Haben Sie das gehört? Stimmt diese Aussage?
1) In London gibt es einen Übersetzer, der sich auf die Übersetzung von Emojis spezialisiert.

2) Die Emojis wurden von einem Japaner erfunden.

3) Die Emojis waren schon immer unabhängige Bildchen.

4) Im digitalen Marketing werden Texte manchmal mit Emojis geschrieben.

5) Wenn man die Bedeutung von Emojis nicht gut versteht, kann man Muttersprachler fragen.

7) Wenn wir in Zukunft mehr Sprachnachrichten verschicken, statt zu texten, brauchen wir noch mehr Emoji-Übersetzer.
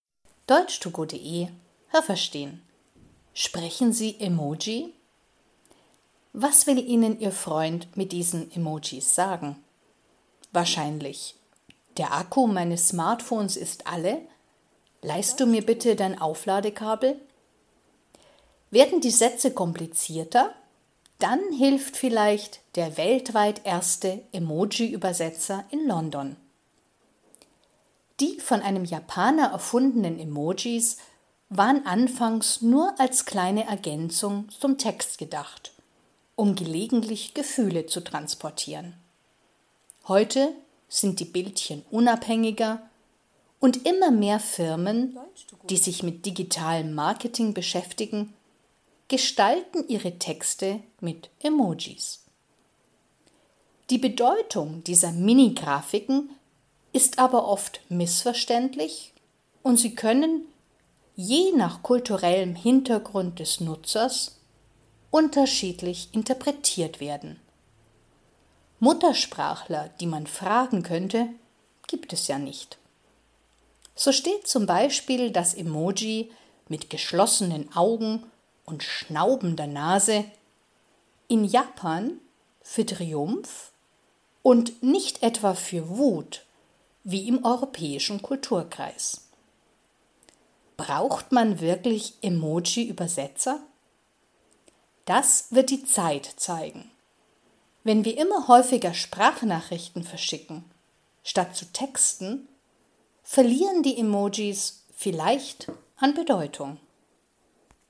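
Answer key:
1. Richtig
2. Richtig
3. Falsch
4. Richtig
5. Falsch
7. Falsch

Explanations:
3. Früher waren sie nur eine kleine Ergänzung zum Text.
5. In der „Emoji-Sprache" gibt es keine Muttersprachler.
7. Wenn wir mehr Sprachnachrichten verschicken, sind Emojis vielleicht nicht mehr so wichtig.

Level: Hörtexte B (mittel)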